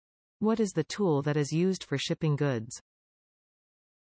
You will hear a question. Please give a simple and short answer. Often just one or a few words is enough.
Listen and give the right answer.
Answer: Container